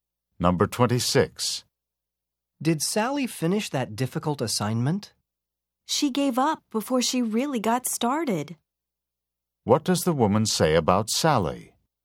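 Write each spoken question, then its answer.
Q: What does the woman say about Sally?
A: Sally gave up almost right away.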